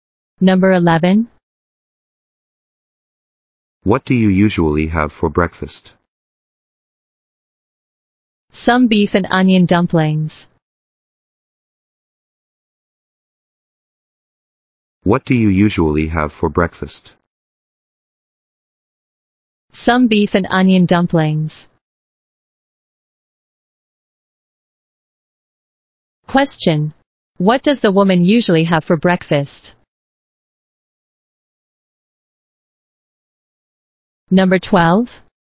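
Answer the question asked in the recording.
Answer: Beef and onion dumplings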